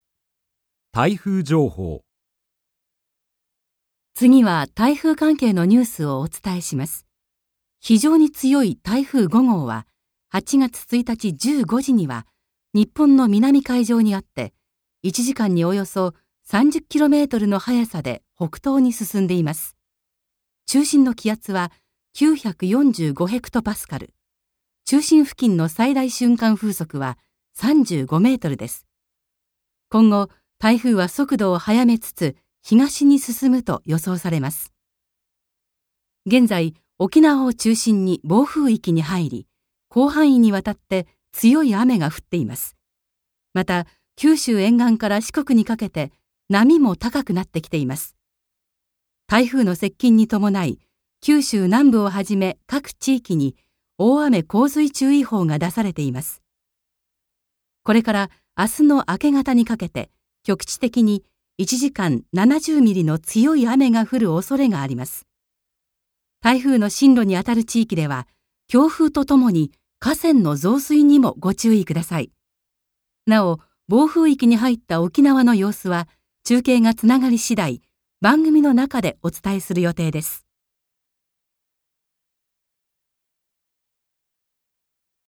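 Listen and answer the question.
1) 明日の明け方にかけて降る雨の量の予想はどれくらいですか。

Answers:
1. 1時間70ミリ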